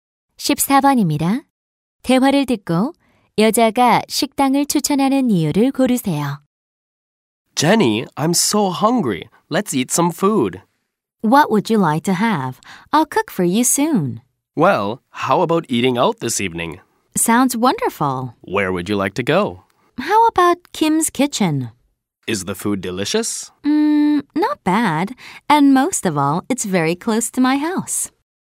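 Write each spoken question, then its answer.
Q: 대화를 듣고 여자가 식당을 추천하는 이유를 고르세요.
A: 집에서 가까워서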